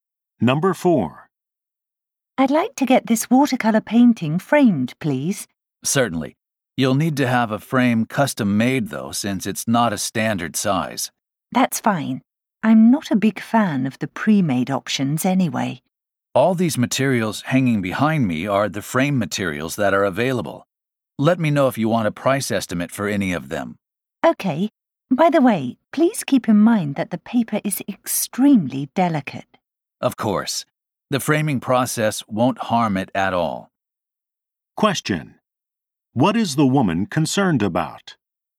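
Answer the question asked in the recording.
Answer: The painting's paper being damaged, since it is extremely delicate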